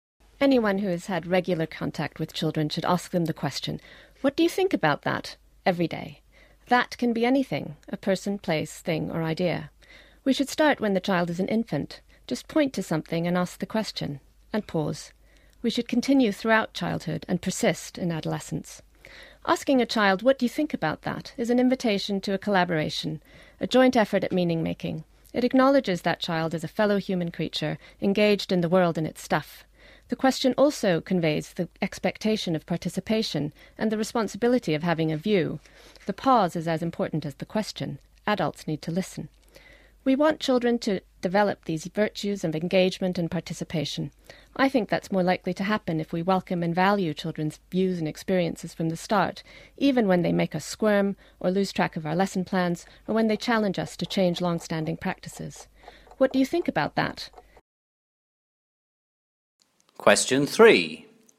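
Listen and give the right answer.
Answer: It invites collaboration in making meaning and encourages engagement, participation and having a view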